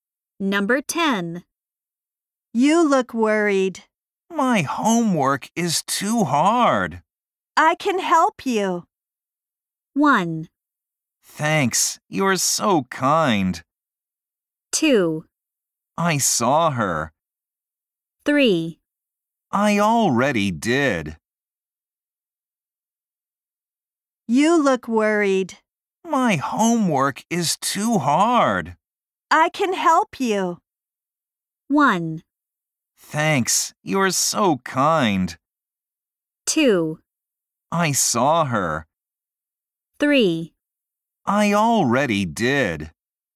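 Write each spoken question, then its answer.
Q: I can help you.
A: 1: Thanks, you're so kind.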